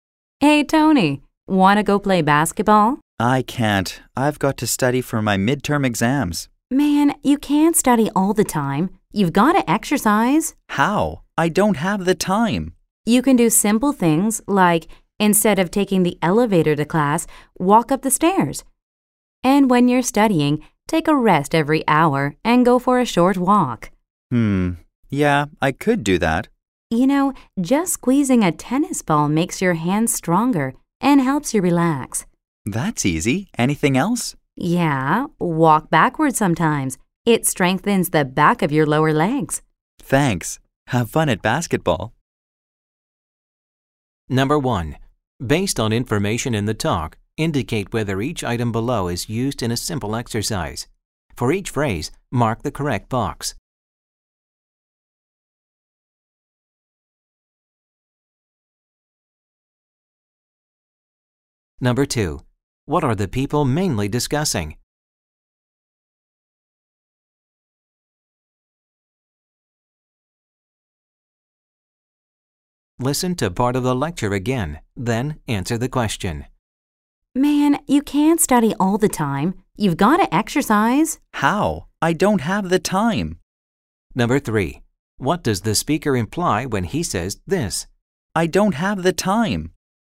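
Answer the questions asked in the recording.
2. Simple ways for a busy student to get exercise
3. He is too busy studying to exercise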